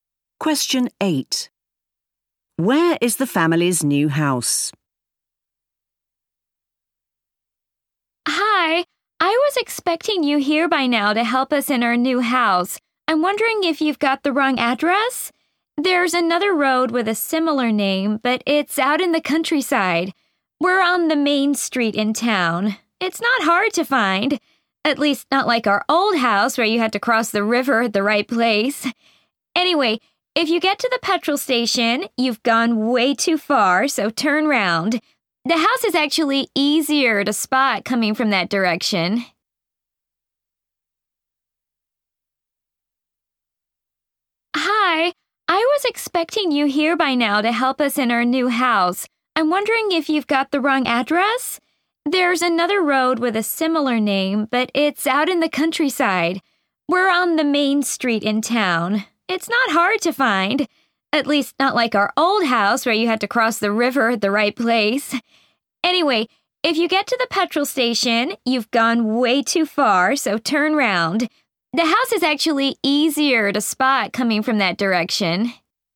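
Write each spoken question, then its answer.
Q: Where is the family's new house?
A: On the main street in town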